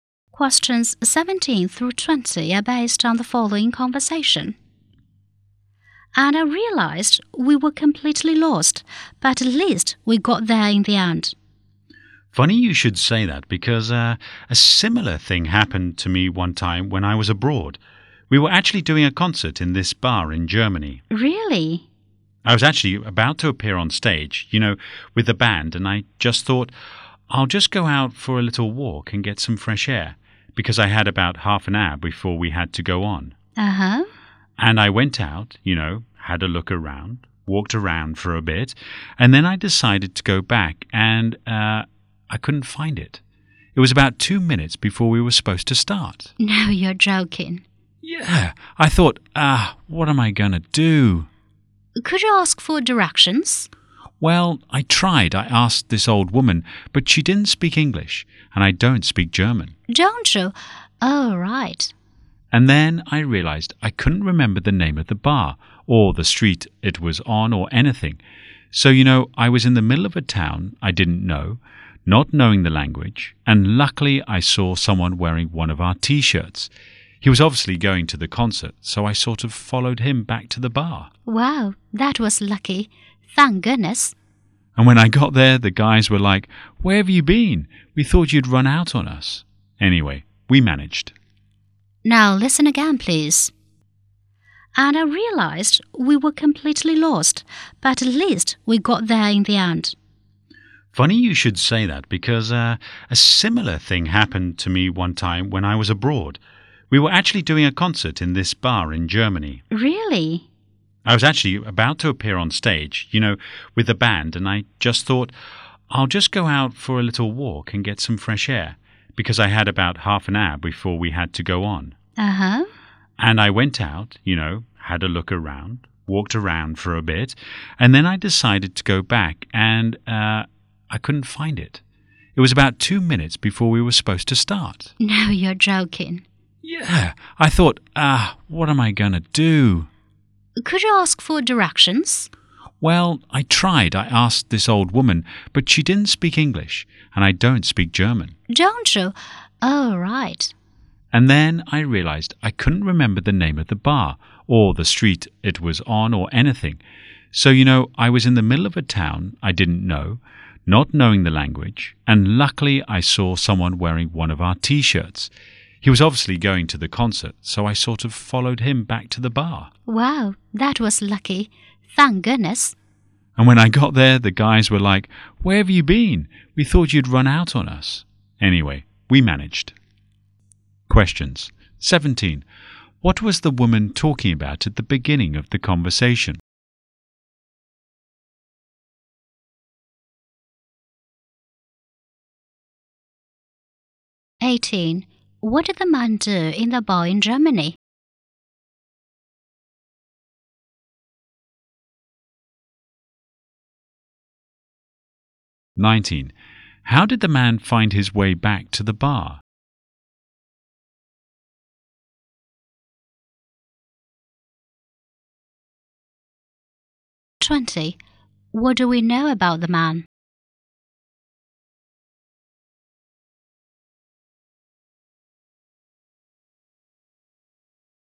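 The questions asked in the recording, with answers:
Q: What was the woman talking about at the beginning of the conversation?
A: Getting lost

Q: What did the man do in the bar in Germany?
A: Perform in a concert with his band

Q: How did the man find his way back to the bar?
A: He followed someone wearing the band's T-shirt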